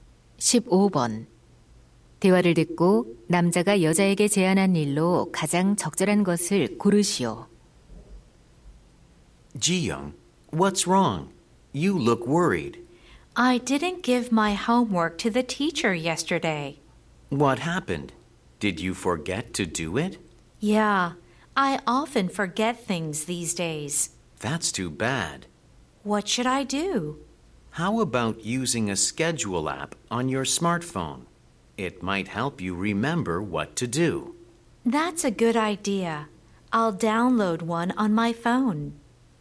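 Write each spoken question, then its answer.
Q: 대화를 듣고 남자가 여자에게 제안한 일로 가장 적절한 것을 고르시오.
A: 스마트폰 일정 관리 앱 사용하기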